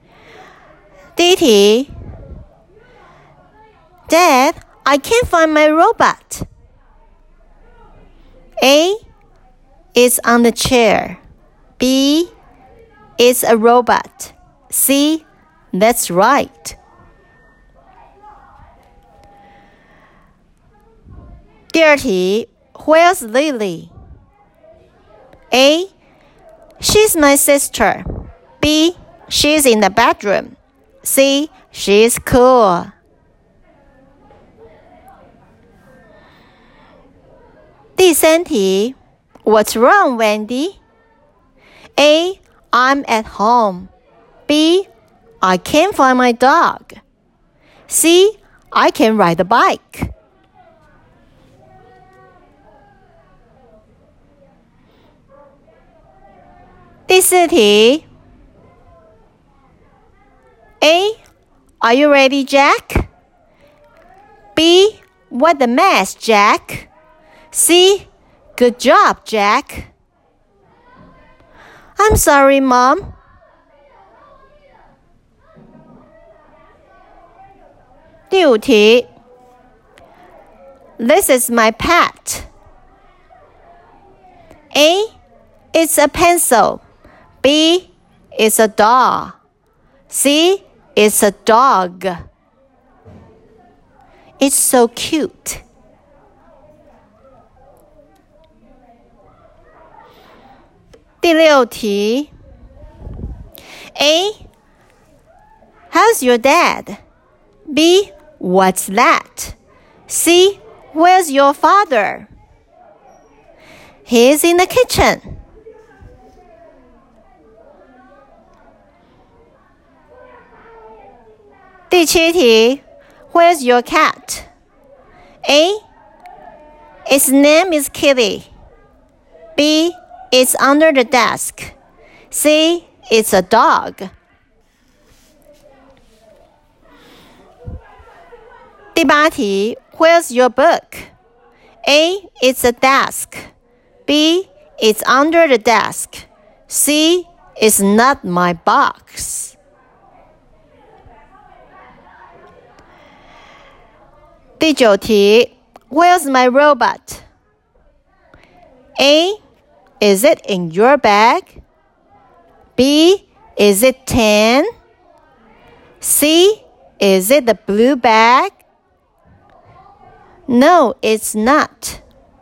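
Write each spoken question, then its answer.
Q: Dad, I can't find my robot.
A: A: is on the chair

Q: where's Lily?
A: B: she's in the bedroom

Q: what's wrong, Wendy?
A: B: I can't find my dog

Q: I'm sorry, Mom.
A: B: what a mess, Jack

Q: This is my pet.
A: C: it's a dog

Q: He's in the kitchen.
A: C: where's your father?

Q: Where's your cat?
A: B: it's under the desk

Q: where's your book?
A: B: it's under the desk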